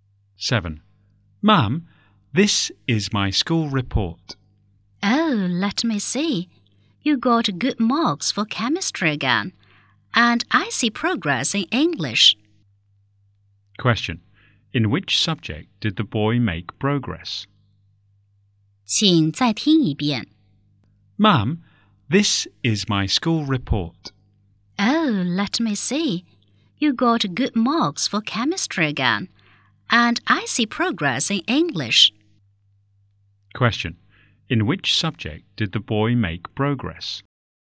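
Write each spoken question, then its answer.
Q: In which subject did the boy make progress?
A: English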